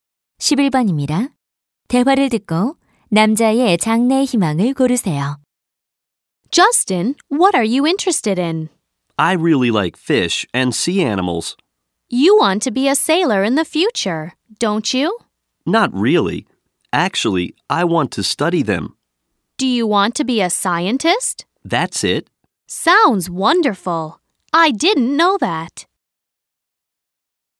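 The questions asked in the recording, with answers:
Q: 대화를 듣고 남자의 장래 희망을 고르세요.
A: 과학자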